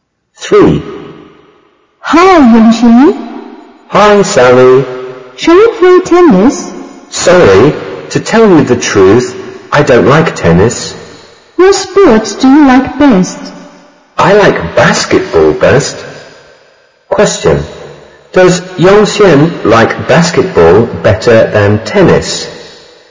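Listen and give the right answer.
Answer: Yes, she does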